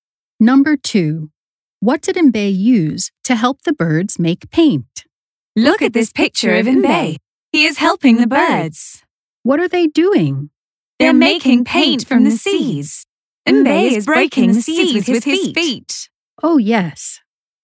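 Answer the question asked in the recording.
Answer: his feet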